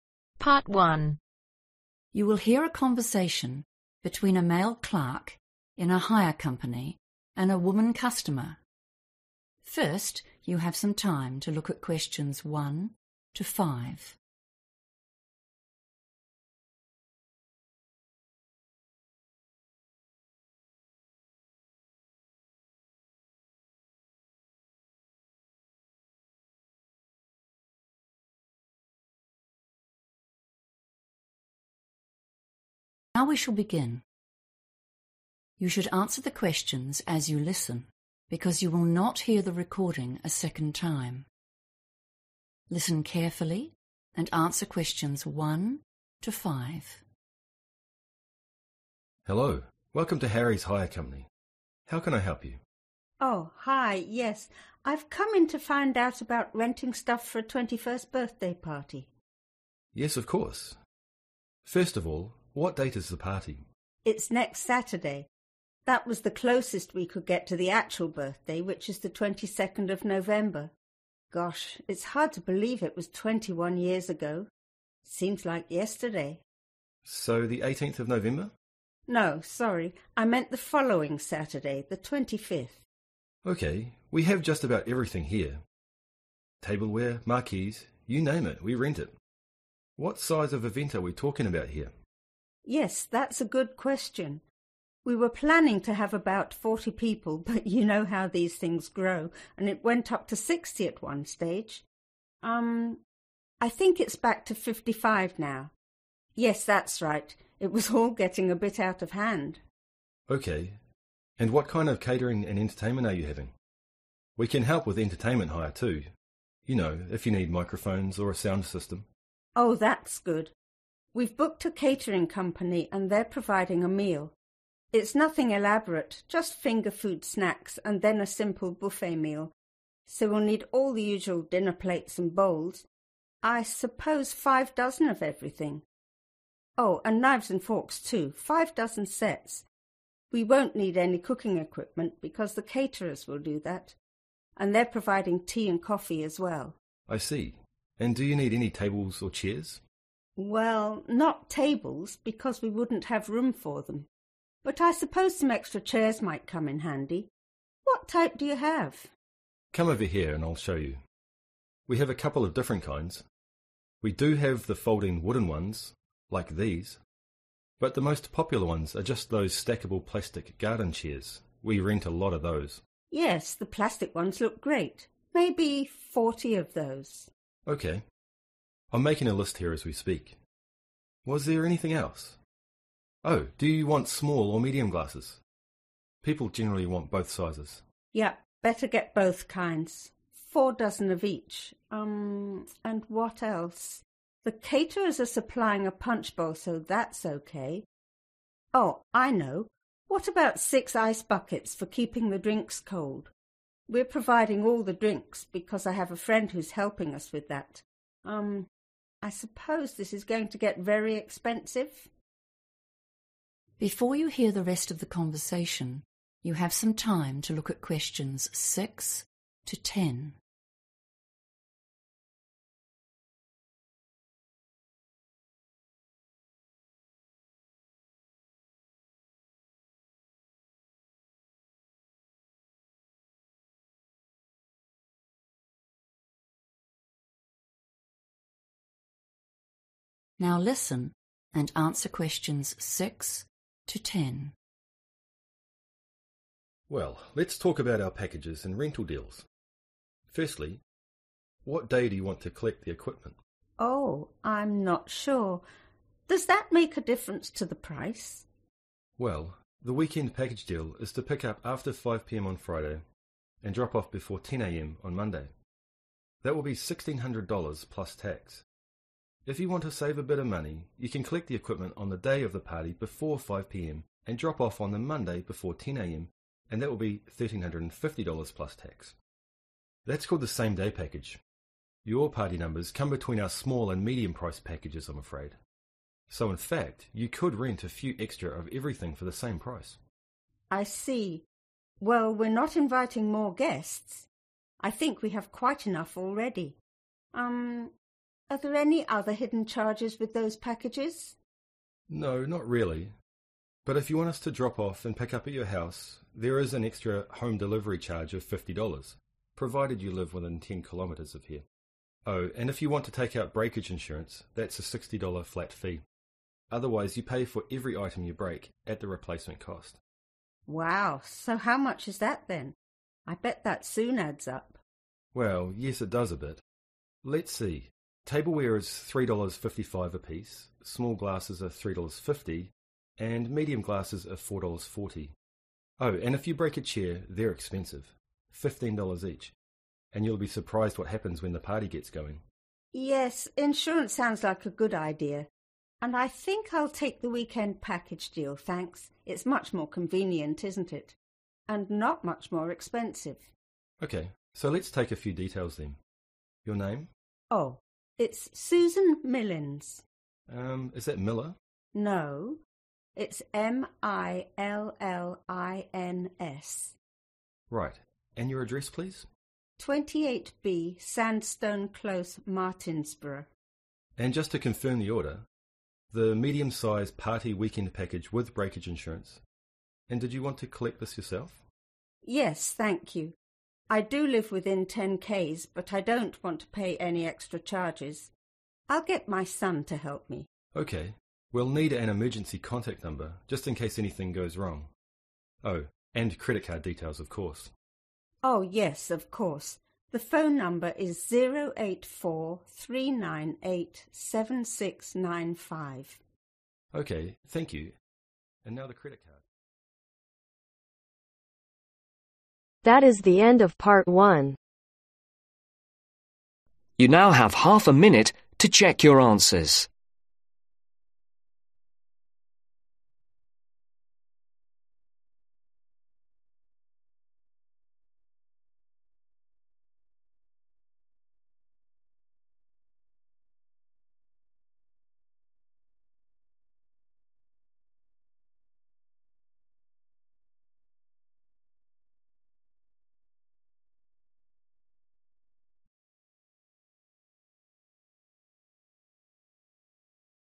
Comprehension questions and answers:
Write NO MORE THAN TWO WORDS AND/OR A NUMBER for each answer.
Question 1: Day and date of event : (1)............ November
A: Saturday 25th/25

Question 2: Number attending event : (2)............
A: 55/fifty-five

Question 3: 5 dozen sets of (3)............ and ............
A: Knives/Forks

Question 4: 40 plastic (4)............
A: (Garden) Chairs

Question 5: six (5)............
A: Ice Buckets

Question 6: (6)............ Package 5 p.m. Sat-10 a.m. Mon: $1350 + tax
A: Same-day/Same day

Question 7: (7)............ $50 (within 10 km)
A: Home Delivery

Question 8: small glasses- (8)............ per item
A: $3.50/three dollars fifty

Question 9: Full name : (9)............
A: Susan Millins

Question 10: Contact number : (10) o84 ............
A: 3987695